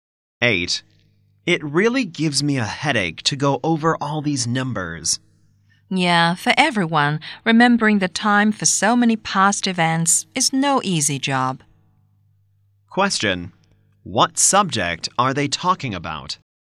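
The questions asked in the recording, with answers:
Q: Question, what subject are they talking about?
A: History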